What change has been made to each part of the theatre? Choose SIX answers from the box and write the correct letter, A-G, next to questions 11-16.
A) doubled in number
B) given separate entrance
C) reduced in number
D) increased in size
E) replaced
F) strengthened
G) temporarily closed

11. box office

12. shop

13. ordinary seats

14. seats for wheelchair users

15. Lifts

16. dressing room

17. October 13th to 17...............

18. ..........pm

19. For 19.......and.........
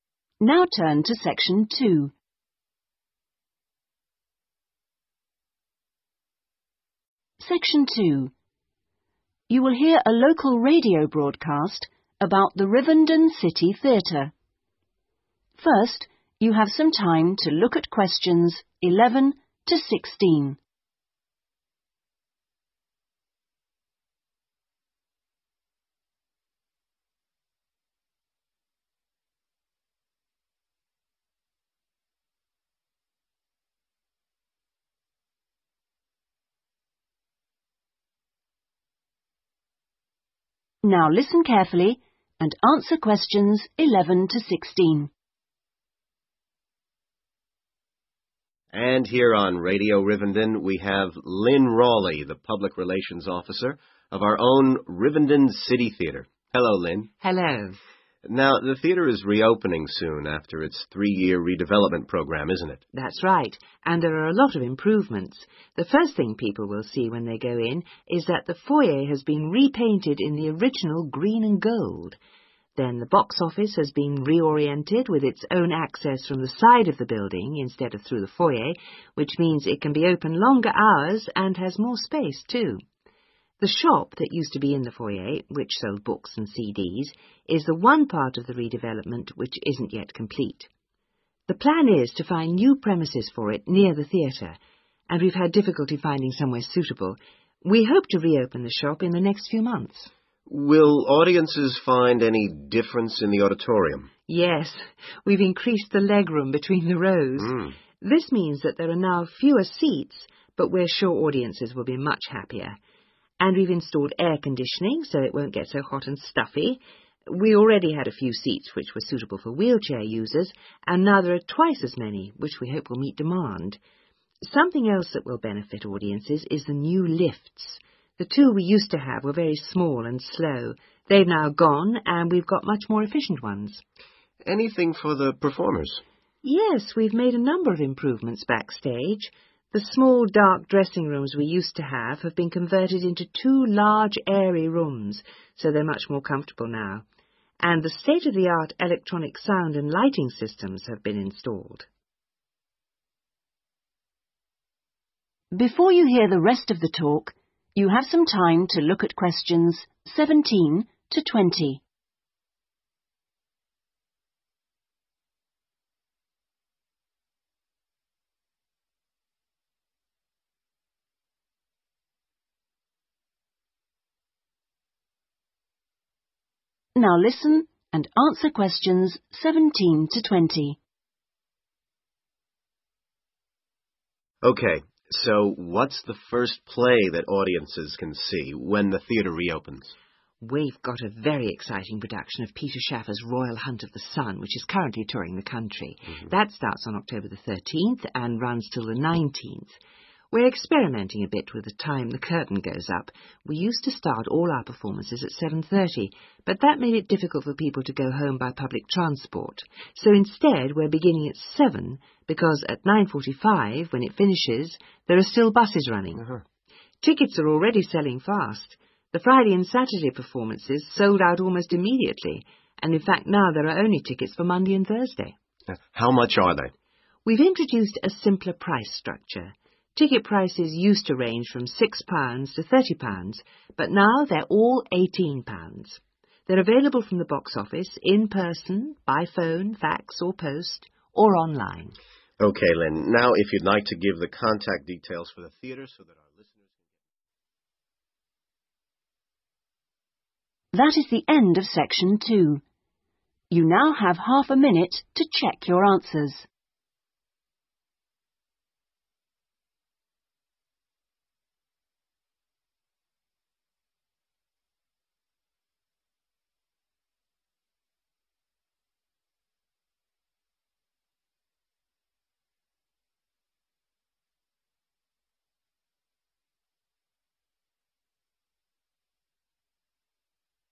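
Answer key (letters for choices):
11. B
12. G
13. C
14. A
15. E
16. D
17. 19th
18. 7
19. Monday and Thursday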